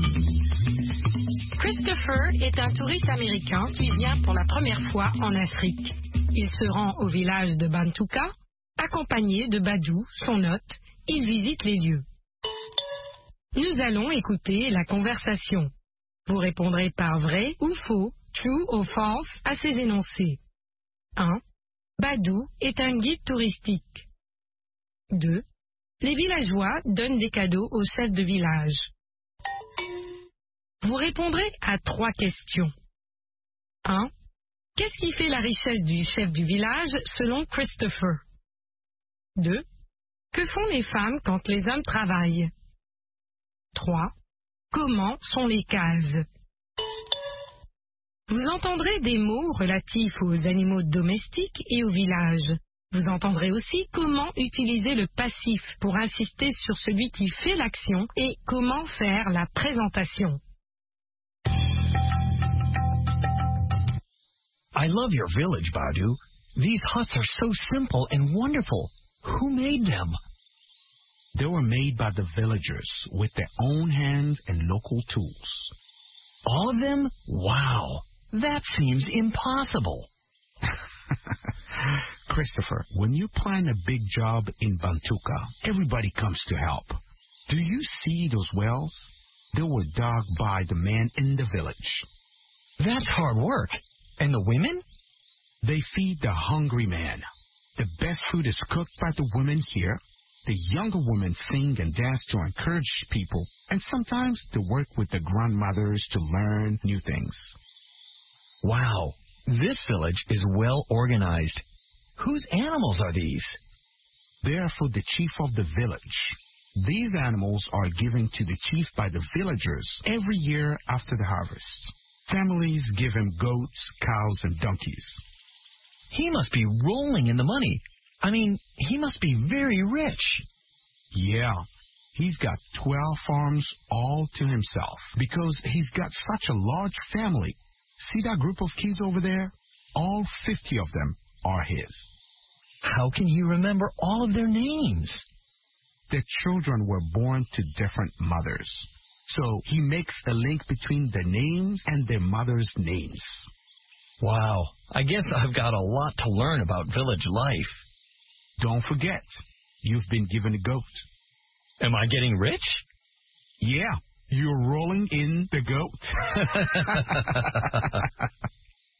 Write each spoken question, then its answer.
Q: Badou est un guide touristique.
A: L'énoncé 1 est faux.

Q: Les villageois donnent des cadeaux aux chefs de village.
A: L'énoncé 2 est vrai. Les villageois donnent des cadeaux au chef de village.

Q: Qu'est-ce qui fait la richesse du chef du village selon Christopher?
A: Ses ânes, ses vaches et ses chèvres.

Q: Que font les femmes quand les hommes travaillent?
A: Elles cuisinent.

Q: Comment sont les cases?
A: Elles sont simples et formidables.